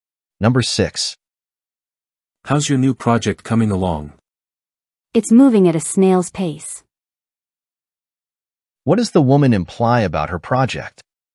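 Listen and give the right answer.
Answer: It is progressing very slowly.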